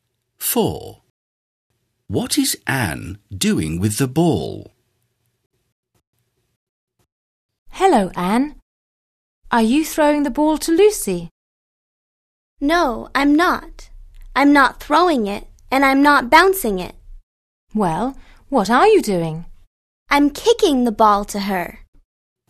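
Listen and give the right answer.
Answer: Kicking it to Lucy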